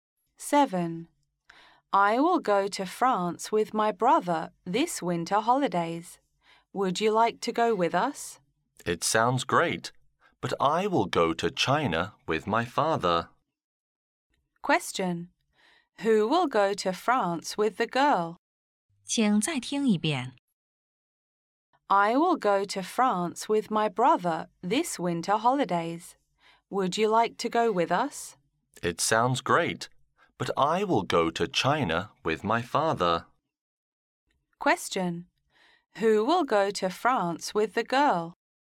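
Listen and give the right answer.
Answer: Her brother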